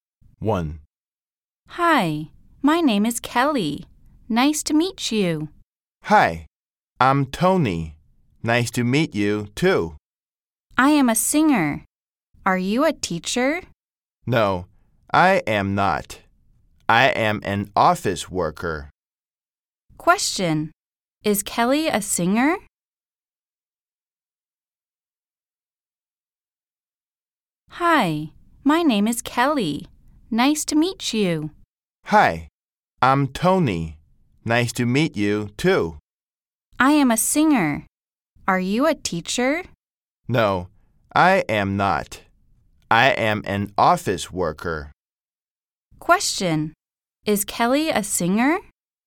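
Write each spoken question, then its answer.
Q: Question, is Kelly a singer?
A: Yes, she is.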